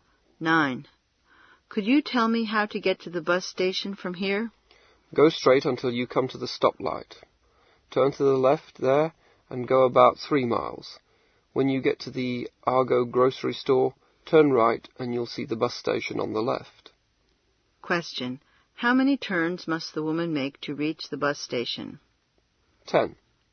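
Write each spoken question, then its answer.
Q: How many turns must the woman make to reach the bus station?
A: Two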